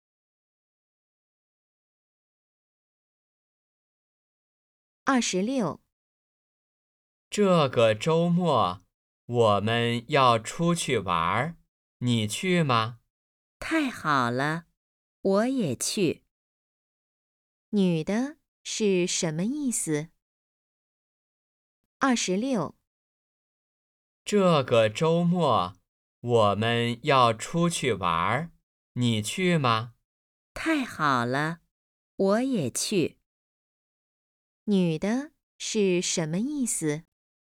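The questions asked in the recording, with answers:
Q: 女的是什么意思?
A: 她也去玩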